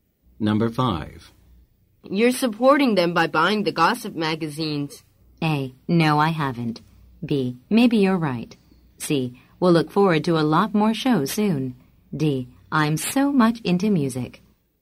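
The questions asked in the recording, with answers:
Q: You're supporting them by buying the gossip magazines.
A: B: Maybe you're right.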